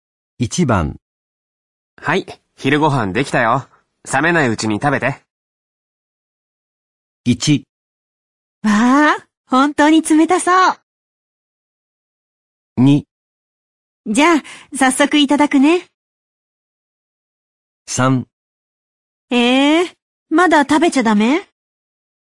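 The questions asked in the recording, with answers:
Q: はい、昼ご飯できたよ。冷めないうちに食べて。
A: 2: じゃあ、早速いただくね。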